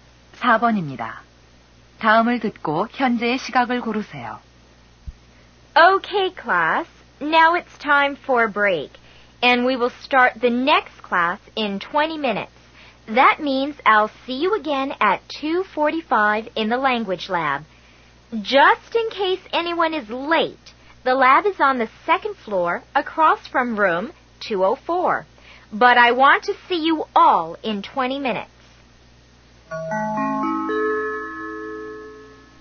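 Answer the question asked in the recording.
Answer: 2시 25분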